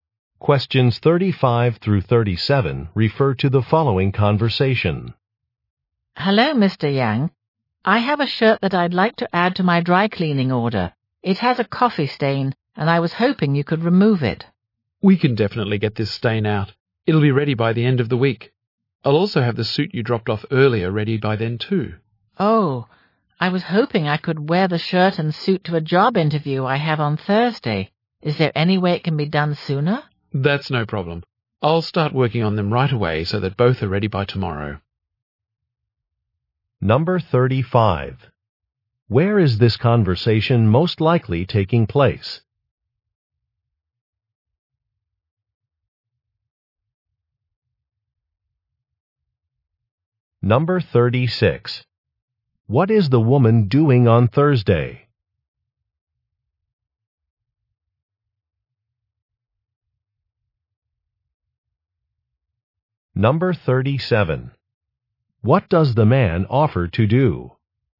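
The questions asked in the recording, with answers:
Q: Where is this conversation most likely taking place?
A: At a dry cleaner's

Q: What is the woman doing on Thursday?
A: Going to a job interview

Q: What does the man offer to do?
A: Have the shirt and suit ready by tomorrow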